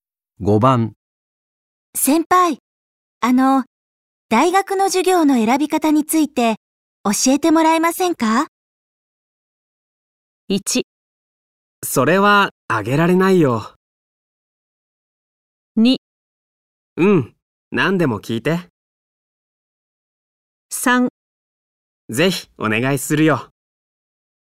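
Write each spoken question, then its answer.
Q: 先輩、大学の授業の選び方について教えてもらえませんか?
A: 2: うん、何でも聞いて。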